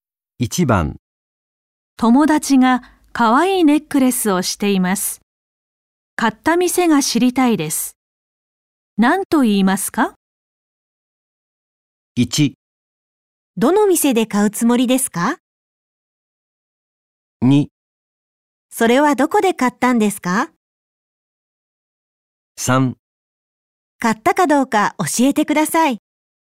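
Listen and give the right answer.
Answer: 2: それはどこで買ったんですか?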